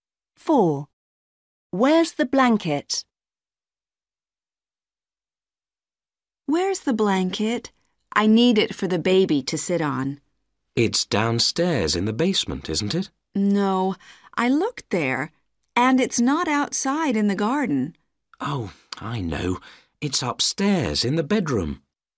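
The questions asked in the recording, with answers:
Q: Where's the blanket?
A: Upstairs in the bedroom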